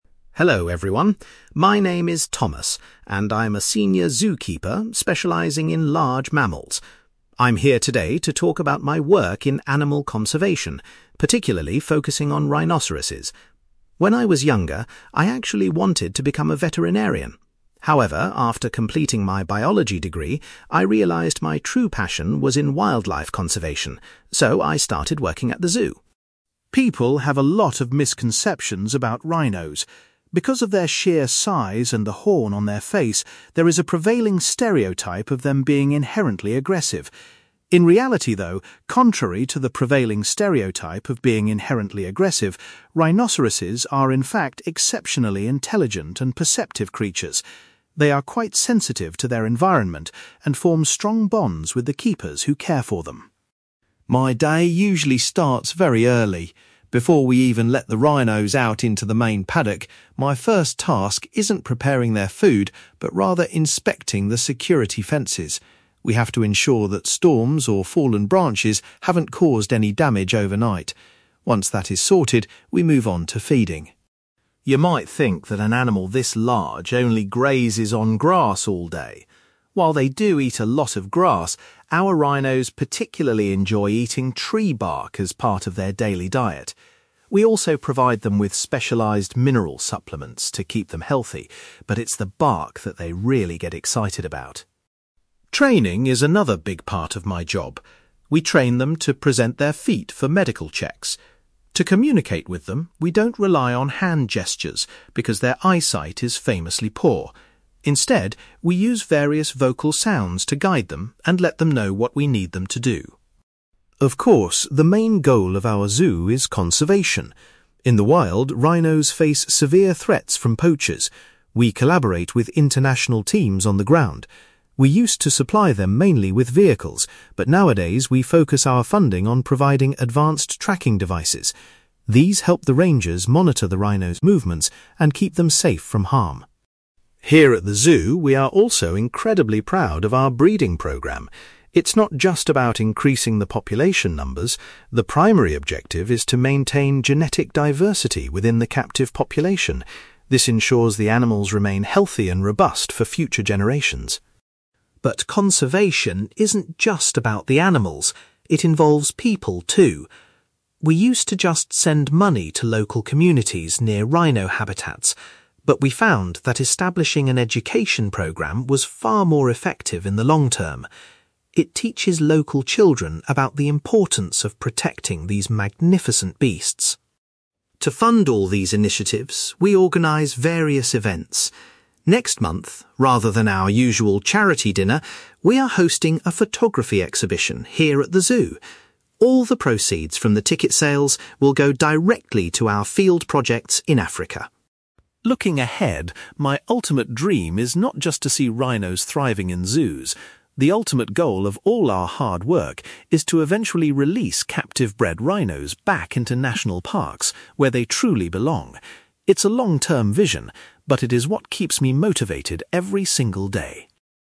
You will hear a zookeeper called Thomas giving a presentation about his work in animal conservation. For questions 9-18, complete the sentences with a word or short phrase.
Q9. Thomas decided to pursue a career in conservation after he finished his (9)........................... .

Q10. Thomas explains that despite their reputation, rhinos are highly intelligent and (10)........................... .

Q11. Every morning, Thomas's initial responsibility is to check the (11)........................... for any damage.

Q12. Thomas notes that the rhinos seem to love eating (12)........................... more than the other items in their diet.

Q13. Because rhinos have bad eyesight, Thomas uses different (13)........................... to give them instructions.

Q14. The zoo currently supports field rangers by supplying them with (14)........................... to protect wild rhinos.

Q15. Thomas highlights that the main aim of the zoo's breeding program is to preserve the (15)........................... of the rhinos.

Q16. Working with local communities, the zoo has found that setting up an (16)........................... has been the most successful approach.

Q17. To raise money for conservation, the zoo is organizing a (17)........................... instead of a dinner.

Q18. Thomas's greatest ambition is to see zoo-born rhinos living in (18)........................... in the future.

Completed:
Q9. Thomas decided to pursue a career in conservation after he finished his biology degree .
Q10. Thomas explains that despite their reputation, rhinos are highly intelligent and perceptive creatures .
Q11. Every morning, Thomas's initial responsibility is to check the security fences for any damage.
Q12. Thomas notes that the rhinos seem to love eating tree bark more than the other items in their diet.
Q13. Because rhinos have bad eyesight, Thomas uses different vocal sounds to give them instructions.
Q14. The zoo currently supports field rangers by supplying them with tracking devices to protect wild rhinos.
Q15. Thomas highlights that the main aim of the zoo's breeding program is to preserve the genetic diversity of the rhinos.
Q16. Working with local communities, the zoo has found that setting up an education program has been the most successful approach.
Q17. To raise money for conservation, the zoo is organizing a photography exhibition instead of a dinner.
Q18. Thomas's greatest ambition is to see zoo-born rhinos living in national parks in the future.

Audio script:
Thomas: Hello everyone, my name is Thomas, and I'm a senior zookeeper specializing in large mammals. I'm here today to talk about my work in animal conservation, particularly focusing on rhinoceroses. When I was younger, I actually wanted to become a veterinarian. However, after completing my biology degree, I realized my true passion was in wildlife conservation, so I started working at the zoo.
People have a lot of misconceptions about rhinos. Because of their sheer size and the horn on their face, there is a prevailing stereotype of them being inherently aggressive. In reality, though, contrary to the prevailing stereotype of being inherently aggressive, rhinoceroses are, in fact, exceptionally intelligent and perceptive creatures. They are quite sensitive to their environment and form strong bonds with the keepers who care for them.
My day usually starts very early. Before we even let the rhinos out into the main paddock, my first task isn't preparing their food, but rather inspecting the security fences. We have to ensure that storms or fallen branches haven't caused any damage overnight. Once that is sorted, we move on to feeding.
You might think that an animal this large only grazes on grass all day. While they do eat a lot of grass, our rhinos particularly enjoy eating tree bark as part of their daily diet. We also provide them with specialized mineral supplements to keep them healthy, but it's the bark that they really get excited about.
Training is another big part of my job. We train them to present their feet for medical checks. To communicate with them, we don't rely on hand gestures, because their eyesight is famously poor. Instead, we use various vocal sounds to guide them and let them know what we need them to do.
Of course, the main goal of our zoo is conservation. In the wild, rhinos face severe threats from poachers. We collaborate with international teams on the ground. We used to supply them mainly with vehicles, but nowadays, we focus our funding on providing advanced tracking devices. These help the rangers monitor the rhinos' movements and keep them safe from harm.
Here at the zoo, we are also incredibly proud of our breeding program. It's not just about increasing the population numbers; the primary objective is to maintain genetic diversity within the captive population. This ensures the animals remain healthy and robust for future generations.
But conservation isn't just about the animals; it involves people, too. We used to just send money to local communities near rhino habitats, but we found that establishing an education program was far more effective in the long term. It teaches local children about the importance of protecting these magnificent beasts.
To fund all these initiatives, we organize various events. Next month, rather than our usual charity dinner, we are hosting a photography exhibition here at the zoo. All the proceeds from the ticket sales will go directly to our field projects in Africa.
Looking ahead, my ultimate dream is not just to see rhinos thriving in zoos. The ultimate goal of all our hard work is to eventually release captive-bred rhinos back into national parks where they truly belong.

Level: B2